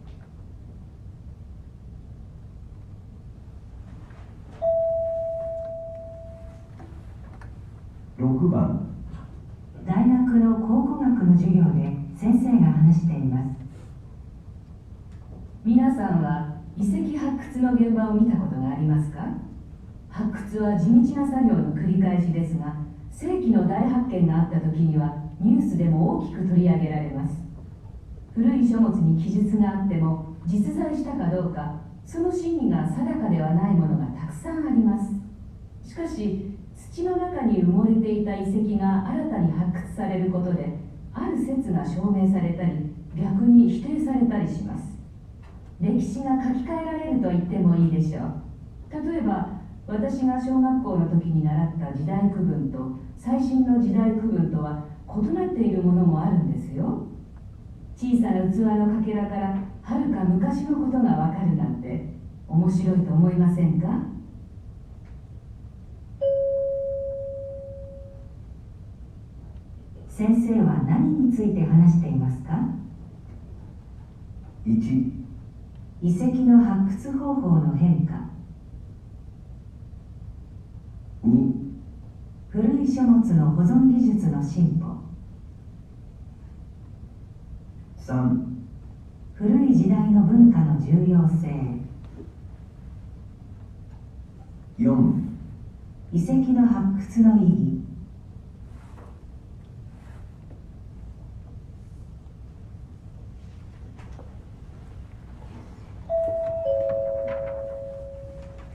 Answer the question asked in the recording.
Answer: 4

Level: N1 Listening · Test 2